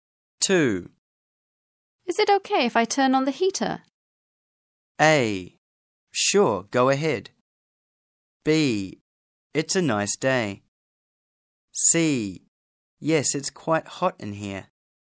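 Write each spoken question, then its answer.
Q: Is it okay if I turn on the heater?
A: A: Sure, go ahead.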